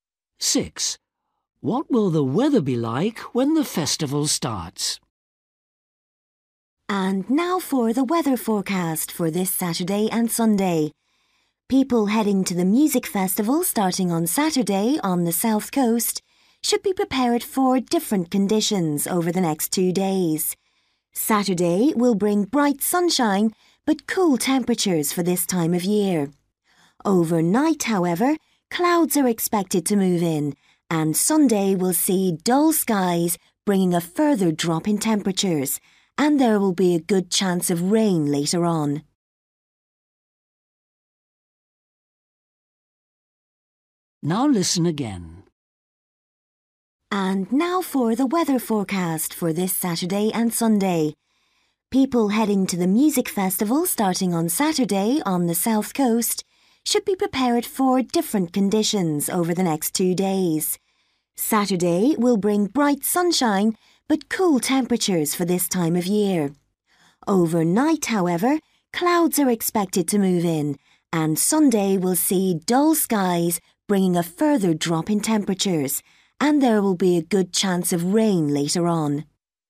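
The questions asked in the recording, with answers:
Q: What will the weather be like when the festival starts?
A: sunny but cool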